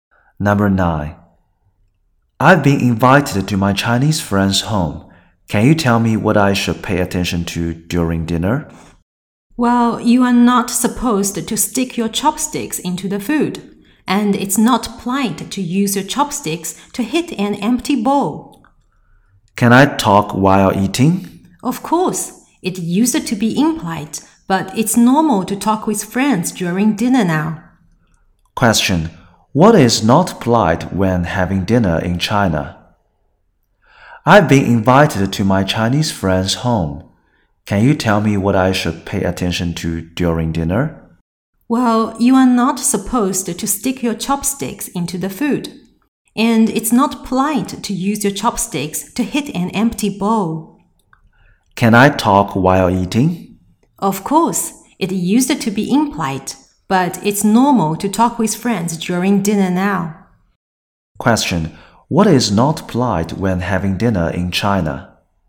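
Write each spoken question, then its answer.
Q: What is not polite when having dinner in China?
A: Using chopsticks to hit an empty bowl (or sticking chopsticks into the food).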